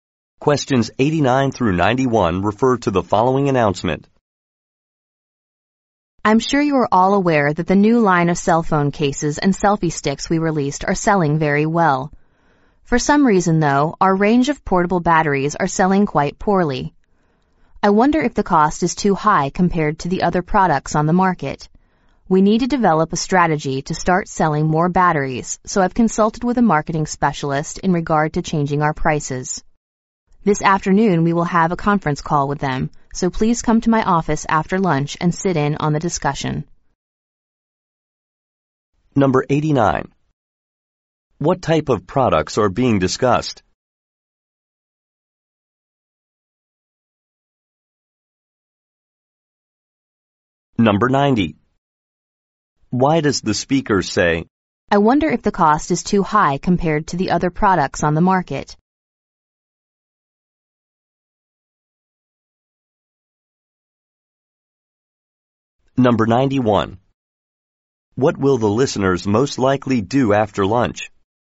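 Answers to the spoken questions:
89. Cell phone accessories, such as portable batteries
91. Join a conference call in the speaker's office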